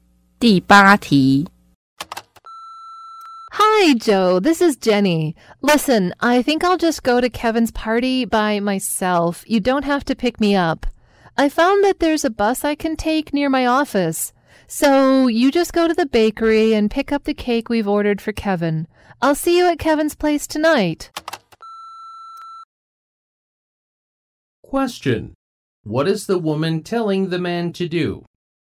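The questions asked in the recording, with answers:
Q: What is the woman telling the man to do?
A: Pick up the cake from the bakery, not pick her up.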